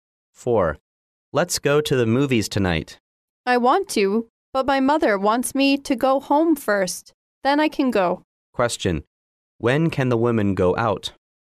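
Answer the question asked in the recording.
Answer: After she goes home first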